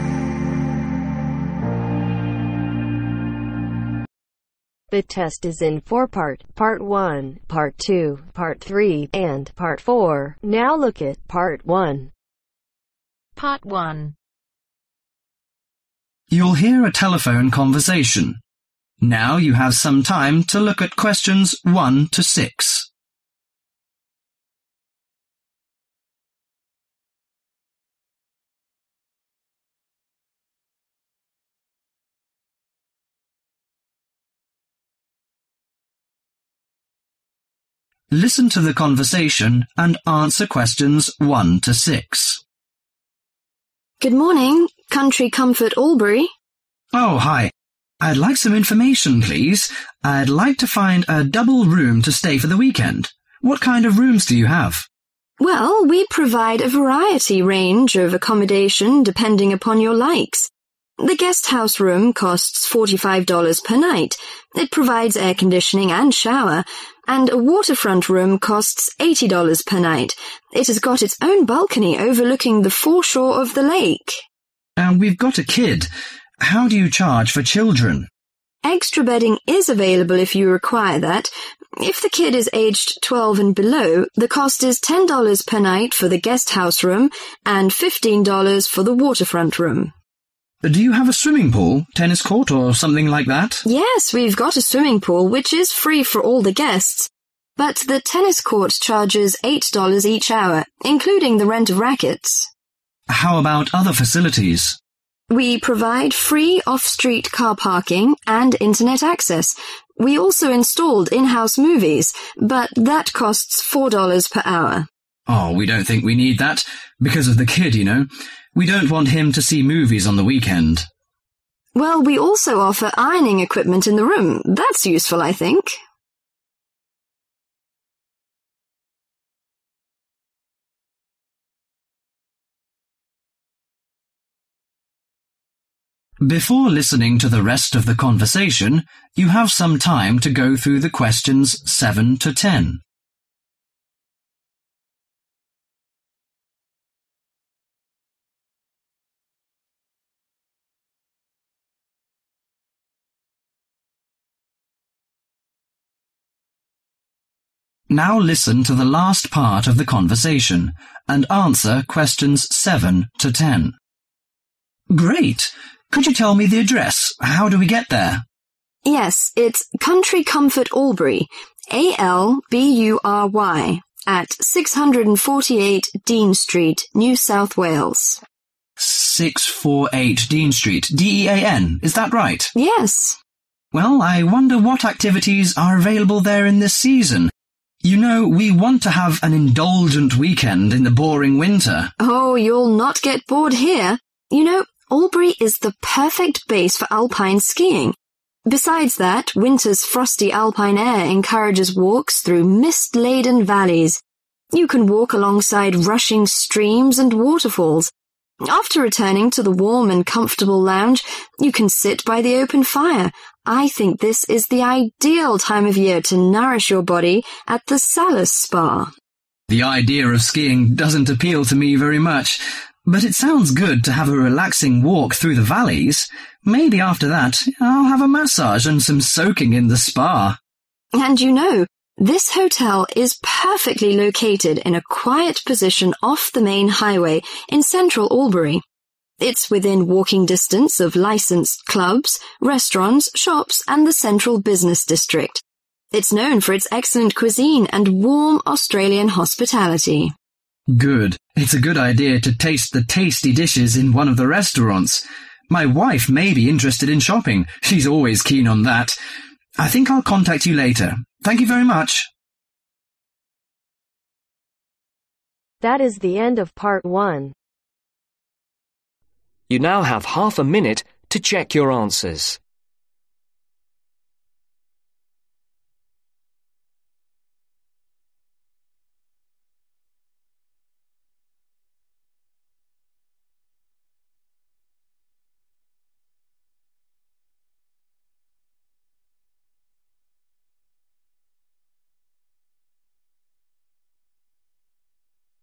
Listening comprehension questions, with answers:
Complete the table below. Write ONE WORD OR A NUMBER for each answer.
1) Guesthouse room | (1) ............ per night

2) Waterfront room | (2) ............ per night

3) with (3) ............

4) (4) ............ for guesthouse room and $15 for waterfront room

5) the tennis (5) ............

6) in housing (6) ............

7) Address: Country Comfort ............ Street, NSW.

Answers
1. $45
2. $80
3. balcony
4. $10
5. court
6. movies
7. Albury, 648 Dean